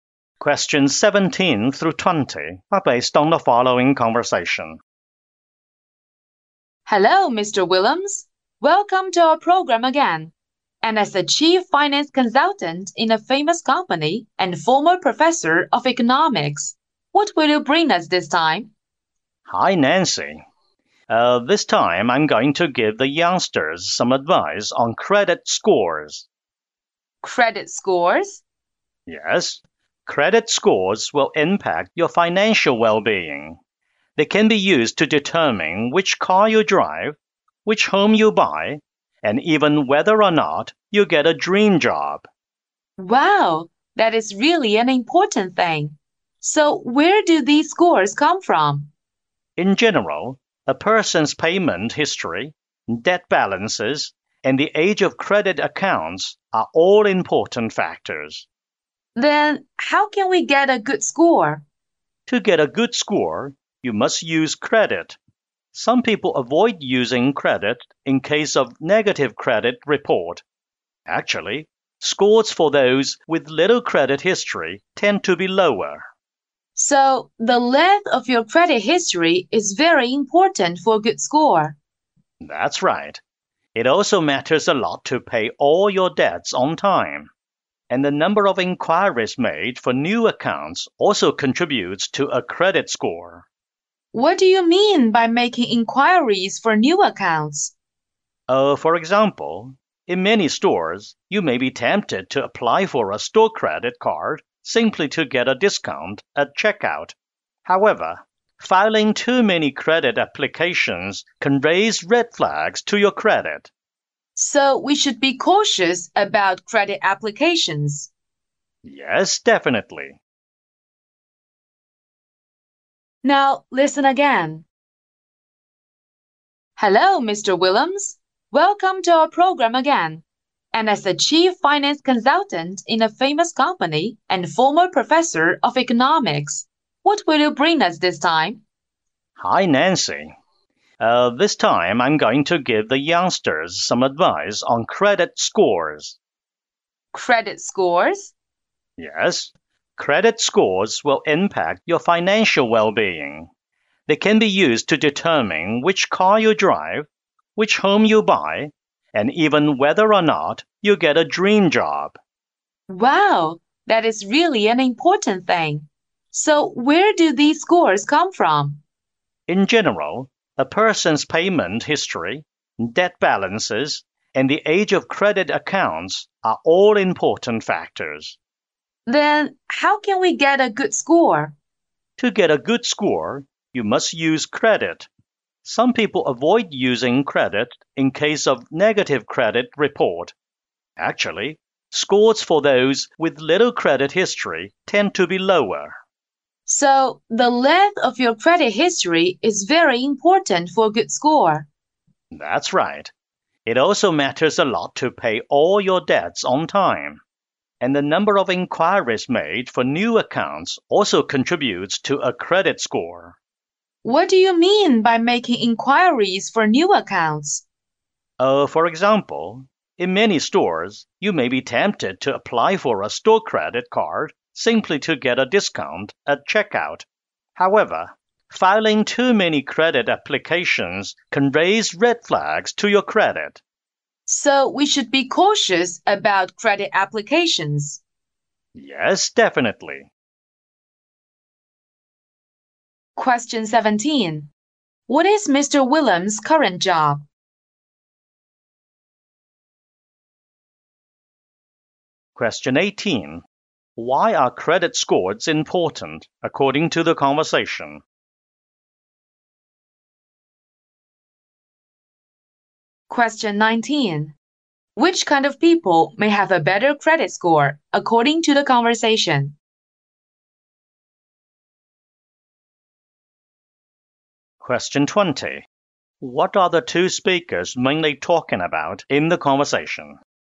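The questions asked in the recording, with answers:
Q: What is Mr. Willems' current job?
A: Chief finance consultant

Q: Why are credit scores important according to the conversation?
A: They affect financial well-being, e.g. car, home, job

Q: Which kind of people may have a better credit score according to the conversation?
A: Those with a long credit history who pay debts on time

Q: What are the two speakers mainly talking about in the conversation?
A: Credit scores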